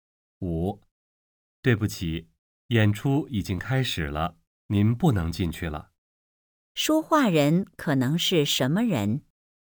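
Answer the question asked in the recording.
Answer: 剧场工作人员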